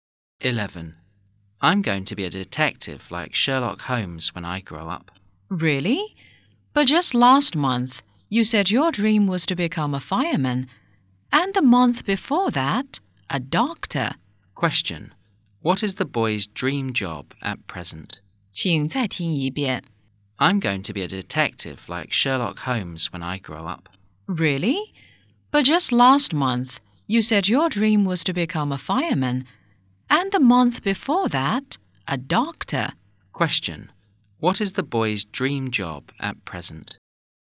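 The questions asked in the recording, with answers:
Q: What is the boy's dream job at present?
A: A detective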